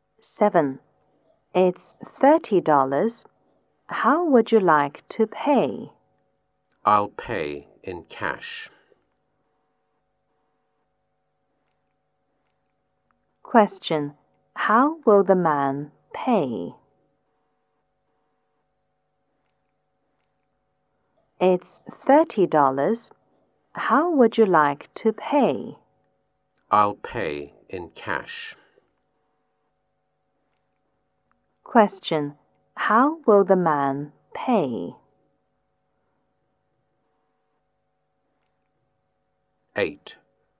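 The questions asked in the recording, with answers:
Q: How will the man pay?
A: In cash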